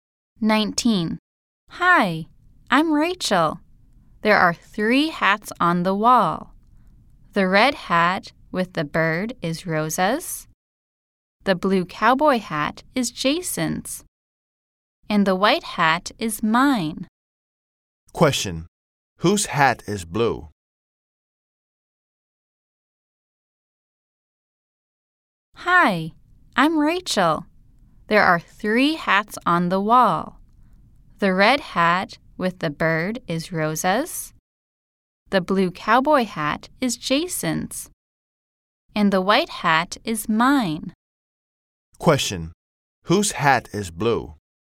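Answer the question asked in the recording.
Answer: Jason's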